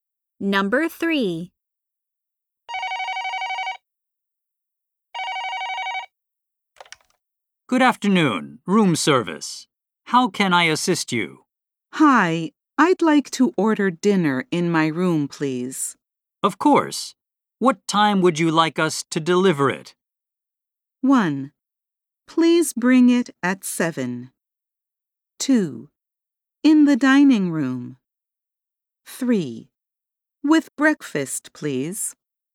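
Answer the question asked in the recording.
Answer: 1: Please bring it at 7.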